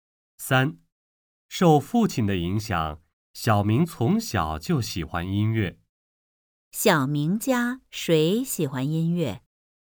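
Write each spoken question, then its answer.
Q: 小明家谁喜欢音乐?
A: 小明和他父亲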